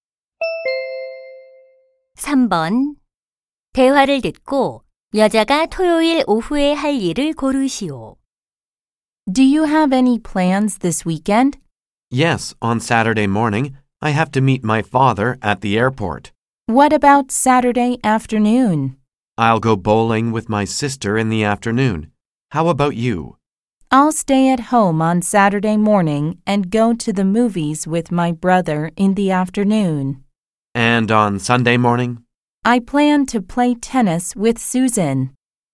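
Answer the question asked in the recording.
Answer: 여동생과 볼링 치기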